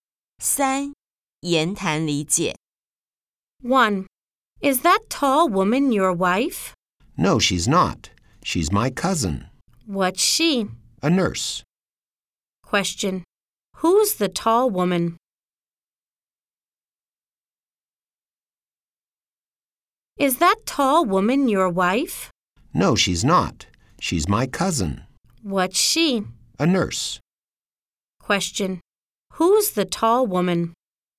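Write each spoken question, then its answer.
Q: Question, who's the tall woman?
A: His cousin (a nurse)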